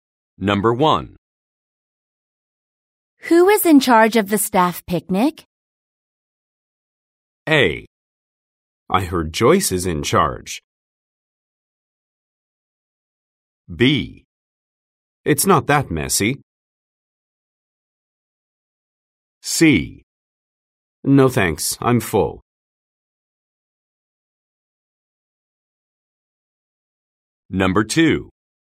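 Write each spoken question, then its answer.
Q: Who is in charge of the staff picnic?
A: A: I heard Joyce is in charge.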